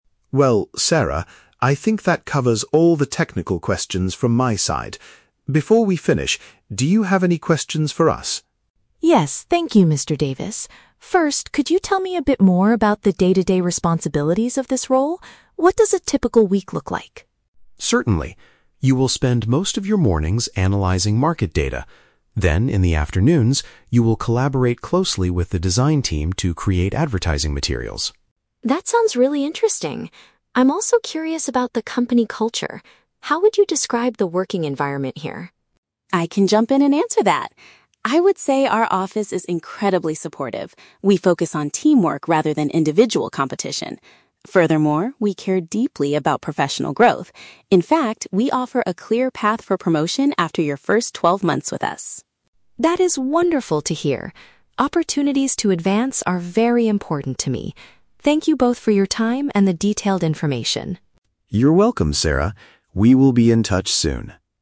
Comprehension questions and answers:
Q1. What will Sarah's main task be during the afternoons if she gets the job?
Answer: To work together with the artists on promotional content.

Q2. How does Ms. Carter describe the atmosphere at the company?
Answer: It encourages mutual help and working as a group.

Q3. What future benefit does the company offer to its employees?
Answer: Opportunities to move up to a higher position.

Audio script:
Mr. Davis (Manager): Well, Sarah, I think that covers all the technical questions from my side. Before we finish, do you have any questions for us?
Sarah (Candidate): Yes, thank you, Mr. Davis. First, could you tell me a bit more about the day-to-day responsibilities of this role? What does a typical week look like?
Mr. Davis: Certainly. You will spend most of your mornings analyzing market data. Then, in the afternoons, you will collaborate closely with the design team to create advertising materials.
Sarah: That sounds really interesting. I'm also curious about the company culture. How would you describe the working environment here?
Carter (HR): I can jump in and answer that! I would say our office is incredibly supportive. We focus on teamwork rather than individual competition. Furthermore, we care deeply about professional growth. In fact, we offer a clear path for promotion after your first twelve months with us.
Sarah: That is wonderful to hear. Opportunities to advance are very important to me. Thank you both for your time and the detailed information.
Mr. Davis: You're welcome, Sarah. We will be in touch soon.